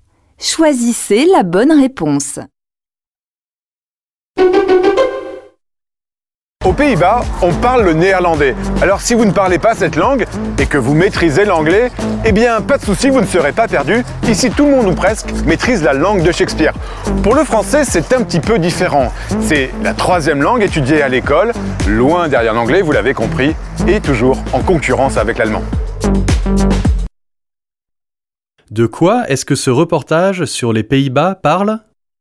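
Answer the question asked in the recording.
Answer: Des langues parlées et apprises aux Pays-Bas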